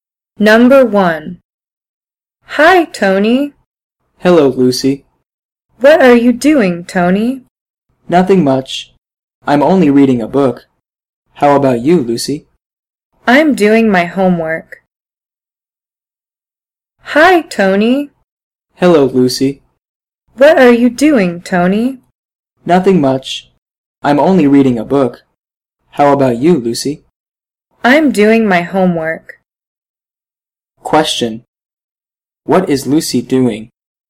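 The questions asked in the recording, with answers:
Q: What is Lucy doing?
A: Doing her homework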